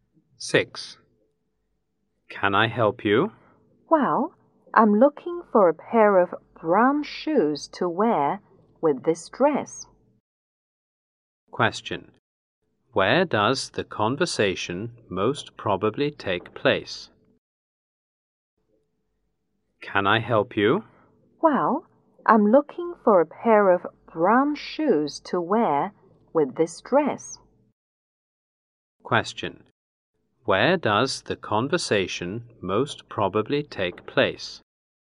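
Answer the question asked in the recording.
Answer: In a shoe shop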